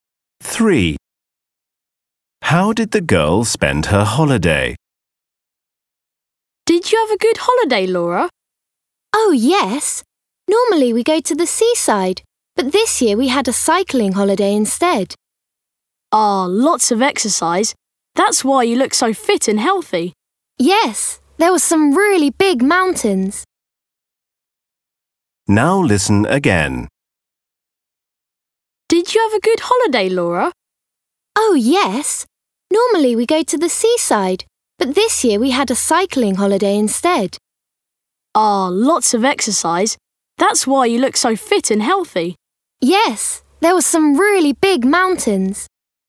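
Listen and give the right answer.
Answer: cycling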